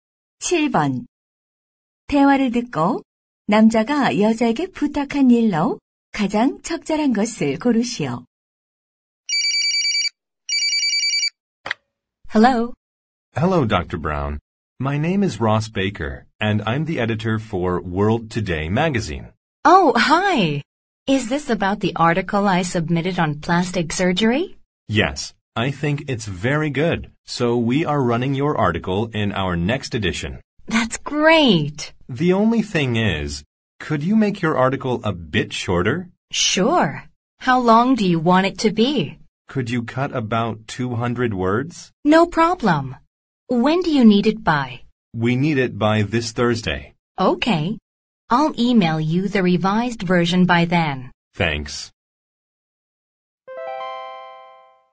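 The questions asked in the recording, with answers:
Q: 대화를 듣고 남자가 여자에게 부탁한 일로 가장 적절한 것을 고르시오.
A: 기사 분량 줄이기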